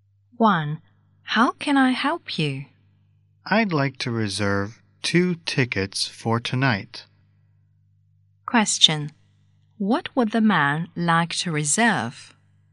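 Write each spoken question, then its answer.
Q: What would the man like to reserve?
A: 2 tickets for tonight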